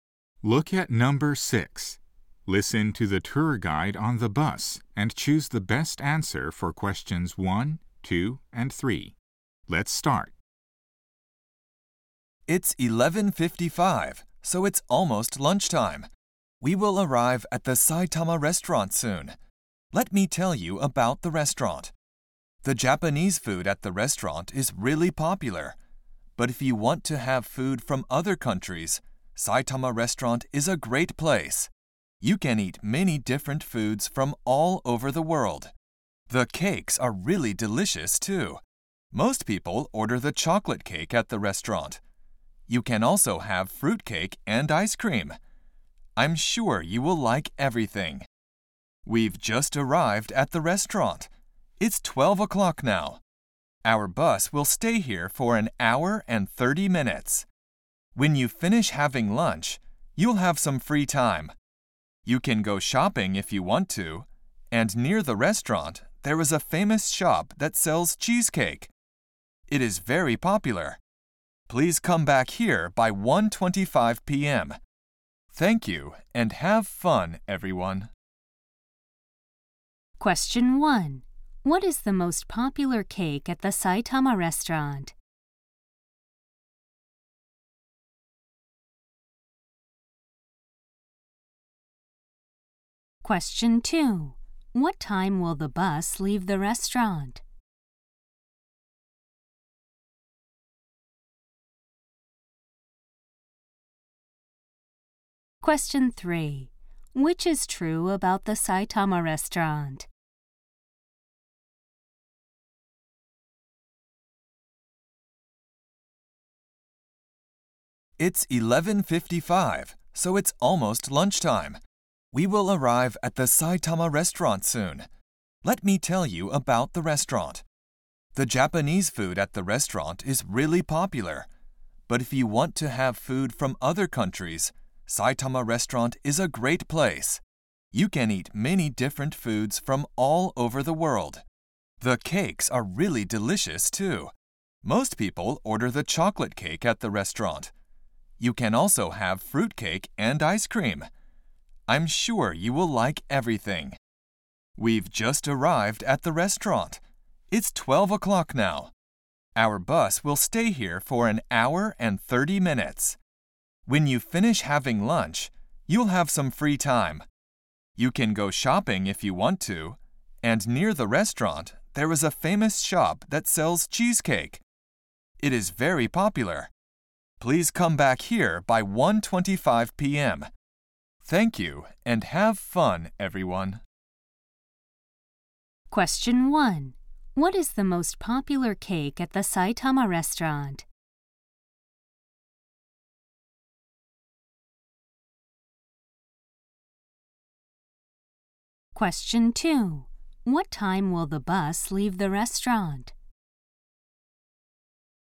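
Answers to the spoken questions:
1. Chocolate cake
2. At 1:30 p.m.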